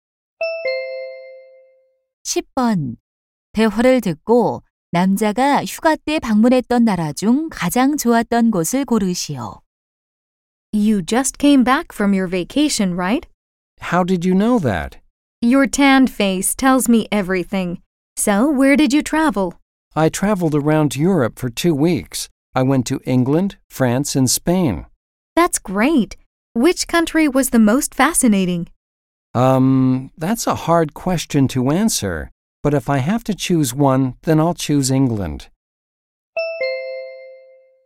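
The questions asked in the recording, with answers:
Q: 대화를 듣고 남자가 휴가 때 방문했던 나라 중 가장 좋았던 곳을 고르시오.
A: 영국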